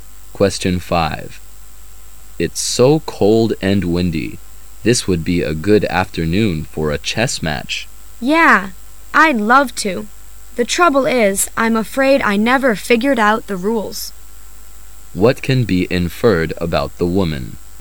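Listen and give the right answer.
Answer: She doesn't know how to play chess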